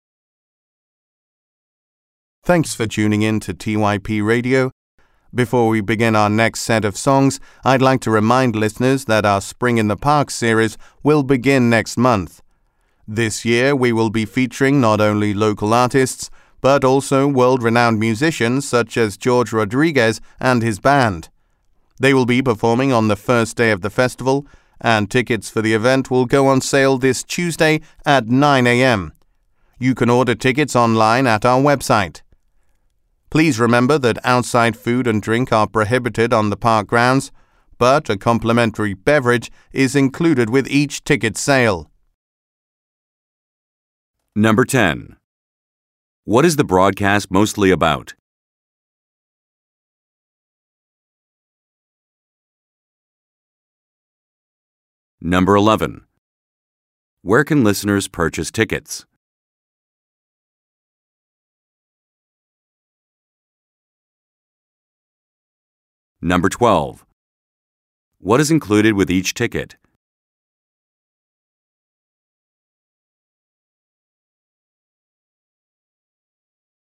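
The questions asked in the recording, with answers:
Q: What is the broadcast mostly about?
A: The upcoming Spring in the Park music series/festival

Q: Where can listeners purchase tickets?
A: Online at the station's website

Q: What is included with each ticket?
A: A complimentary beverage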